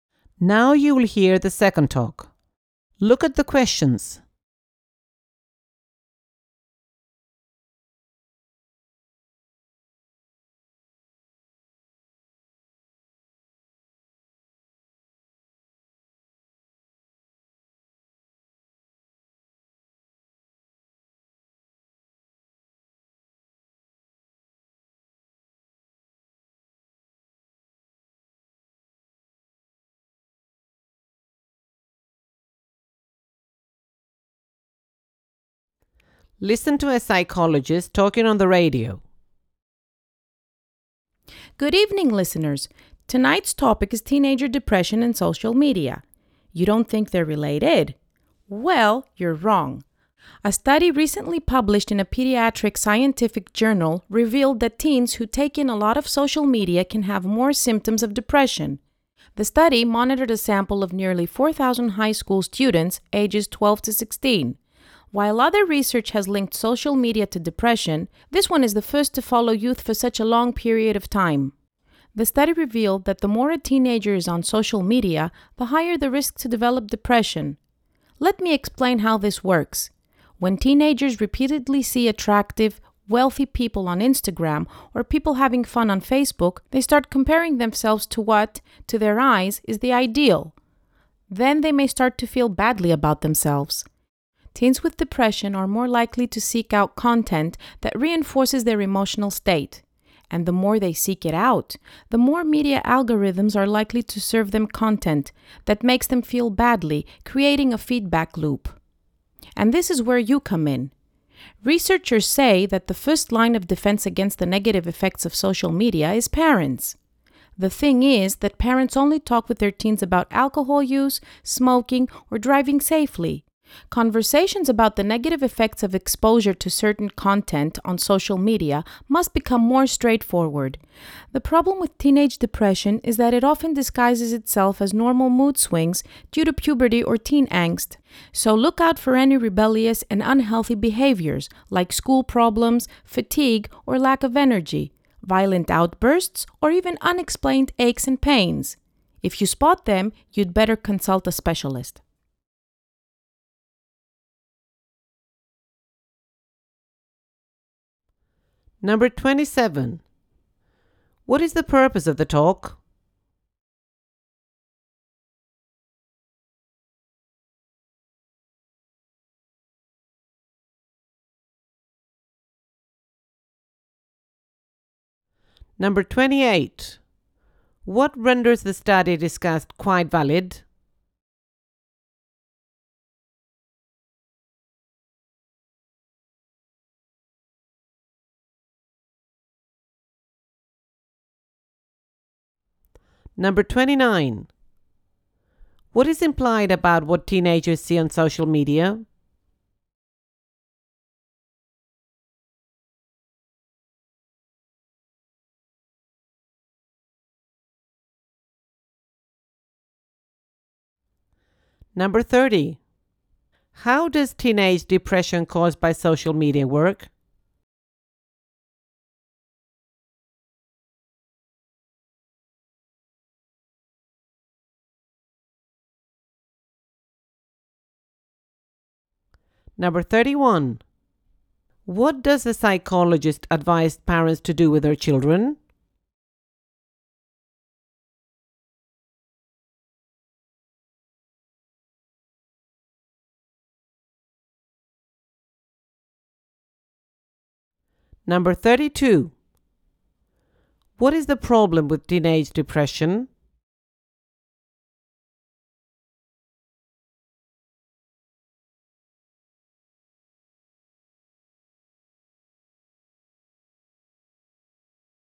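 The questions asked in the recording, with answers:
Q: What is the purpose of the talk?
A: To warn parents about the link between social media and teenage depression

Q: What renders the study discussed quite valid?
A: It followed nearly 4,000 teens for a long period

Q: How does teenage depression caused by social media work?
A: Teens compare themselves to the ideal, feel bad, seek similar content, and algorithms create a feedback loop

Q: What does the psychologist advise parents to do with their children?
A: Talk openly with them about the negative effects of social media content

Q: What is the problem with teenage depression?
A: It often looks like normal puberty mood swings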